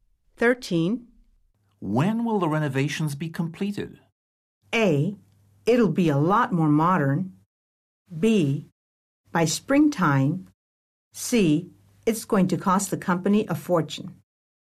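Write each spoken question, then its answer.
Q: When will the renovations be completed?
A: B: By springtime.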